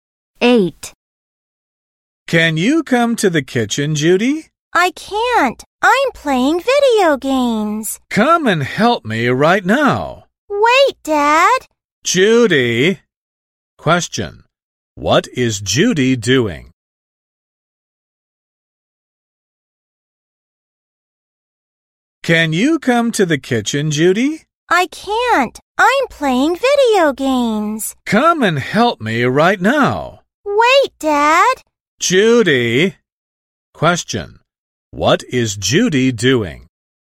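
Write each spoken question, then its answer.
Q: What is Judy doing?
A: Playing video games.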